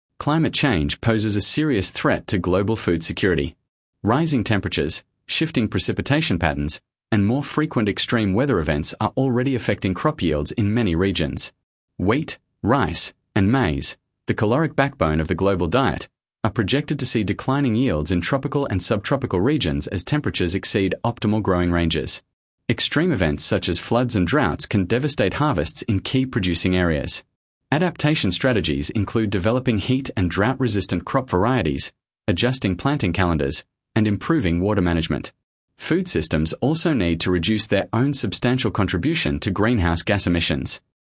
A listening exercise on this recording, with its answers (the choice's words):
Select the paragraph that best summarises the recording.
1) Sample Text 1 — Food Security and Climate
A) A. Food insecurity affects only the poorest nations and is entirely a result of political mismanagement.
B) B. Climate change is one of multiple interconnected causes of food insecurity, compounding existing weaknesses in agricultural and distribution systems.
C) C. Rising food prices are the sole driver of malnutrition globally and are unrelated to climate or conflict.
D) D. Improving agricultural technology will fully resolve food insecurity independently of climate or political factors.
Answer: B. Climate change is one of multiple interconnected causes of food insecurity, compounding existing weaknesses in agricultural and distribution systems.